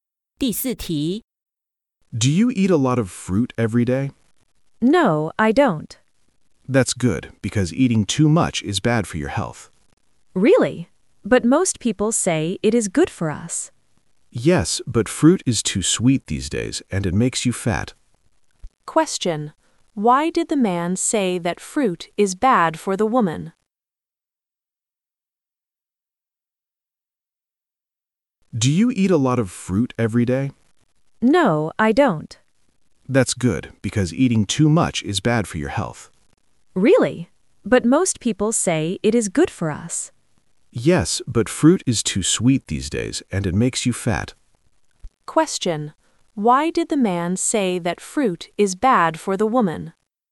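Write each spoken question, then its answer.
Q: Why did the man say that fruit is bad for the woman?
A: Fruit is too sweet these days and makes you fat.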